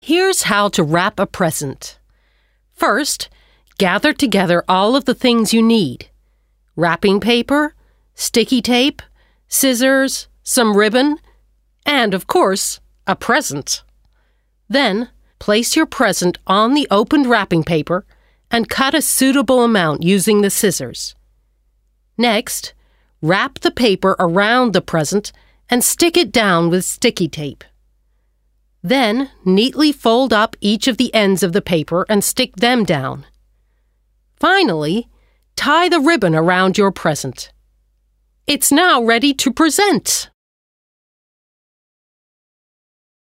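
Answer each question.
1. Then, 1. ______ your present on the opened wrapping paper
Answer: place

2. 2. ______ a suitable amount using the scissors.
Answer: cut

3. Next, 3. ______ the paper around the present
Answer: wrap

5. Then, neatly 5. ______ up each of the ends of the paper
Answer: fold

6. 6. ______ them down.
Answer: stick

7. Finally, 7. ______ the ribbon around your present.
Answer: tie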